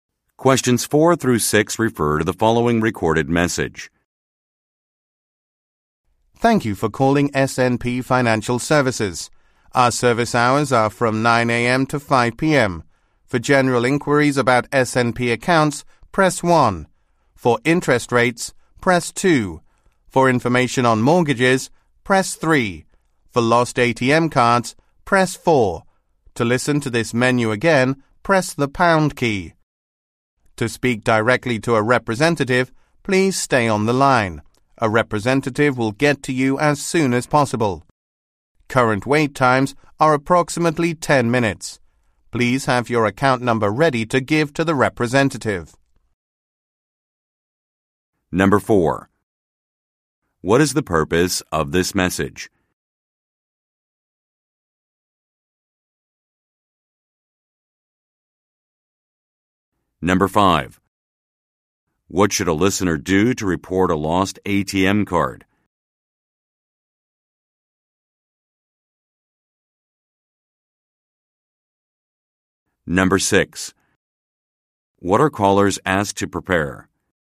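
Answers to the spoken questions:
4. To give callers menu options for SNP Financial Services
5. Press 4
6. Their account number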